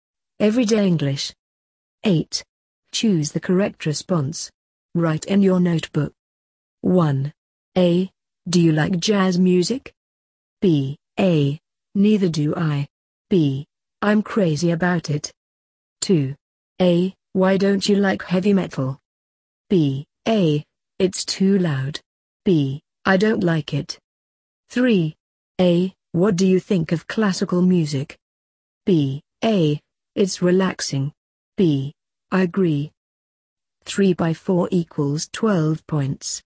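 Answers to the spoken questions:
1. B: I'm crazy about it.
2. A: It's too loud.
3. A: It's relaxing.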